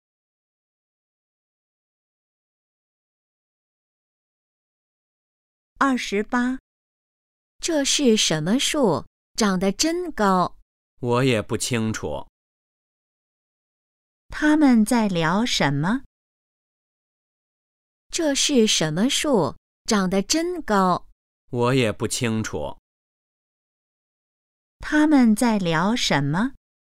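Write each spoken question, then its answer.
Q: 他们在聊什么?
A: 一棵树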